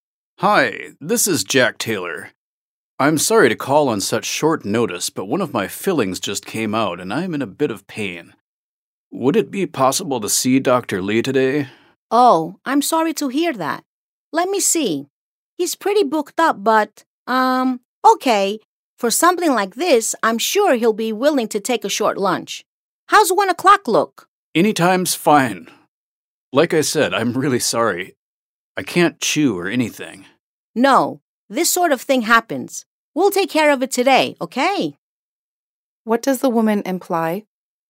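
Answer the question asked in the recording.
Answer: Dr. Lee will probably give up part of his lunch break to see Jack at 1 o'clock today.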